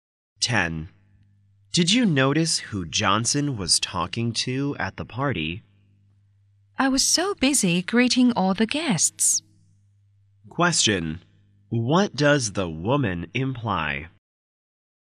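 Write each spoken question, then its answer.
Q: What does the woman imply?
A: She didn't notice who Johnson was talking to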